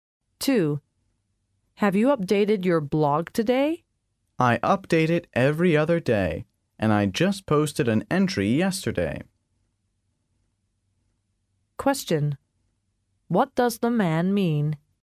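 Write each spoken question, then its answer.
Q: What does the man mean?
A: He doesn't need to update his blog today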